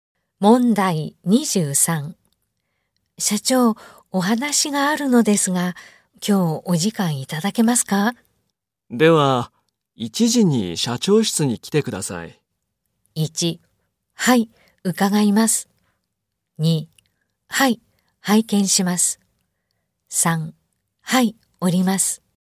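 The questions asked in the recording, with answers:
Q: 社長、お話があるのですが、今日お時間いただけますか?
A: 1: はい、伺います。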